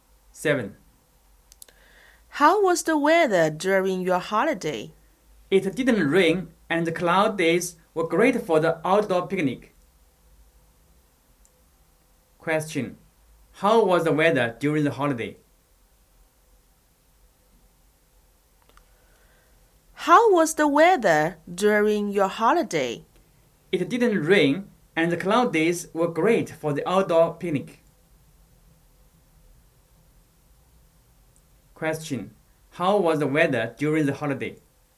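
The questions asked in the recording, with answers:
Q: How was the weather during the holiday?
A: Cloudy and dry, with no rain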